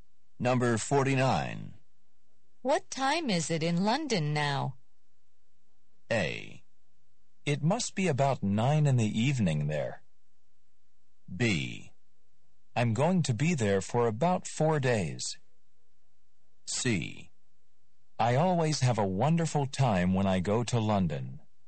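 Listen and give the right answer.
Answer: A: It must be about 9 in the evening there.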